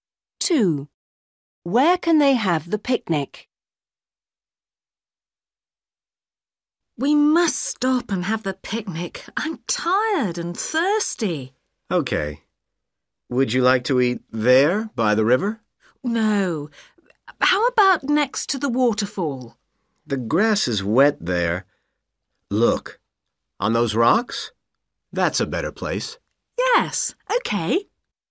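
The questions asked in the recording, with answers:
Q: Where can they have the picnic?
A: On the rocks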